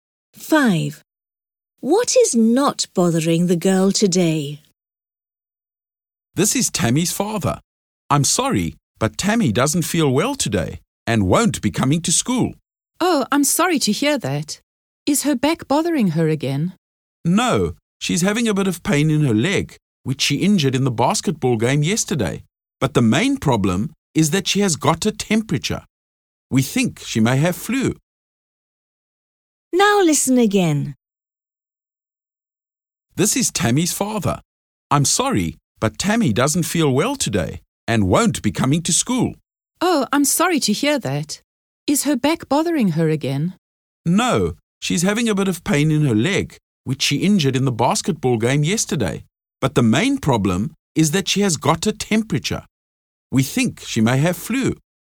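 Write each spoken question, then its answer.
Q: What is not bothering the girl today?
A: Her back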